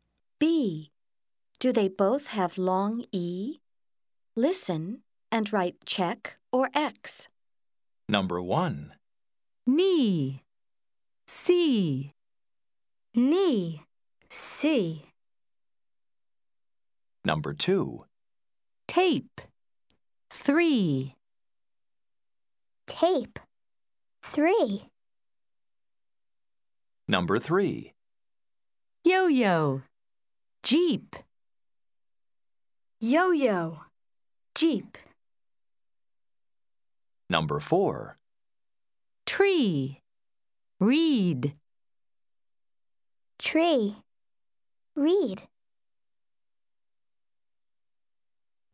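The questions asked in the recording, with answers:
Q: Knee. See.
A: check (both have long E)

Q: Tape. 3.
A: X (tape does not have long E)

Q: Yo-yo. Jeep.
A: X (yo-yo does not have long E)

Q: Tree. Read.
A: check (both have long E)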